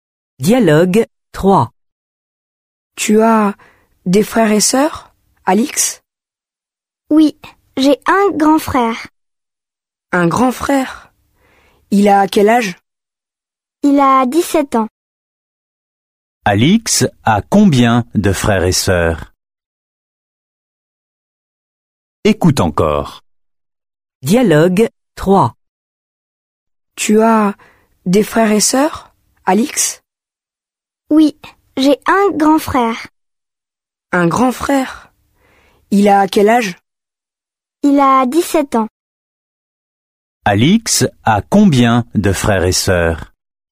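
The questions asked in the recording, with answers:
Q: Alix a combien de frères et sœurs?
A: Un grand frère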